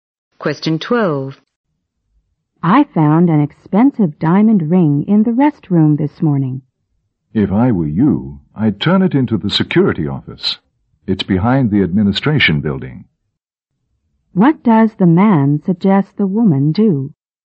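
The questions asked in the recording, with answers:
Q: What does the man suggest the woman do?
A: Turn the ring in to the security office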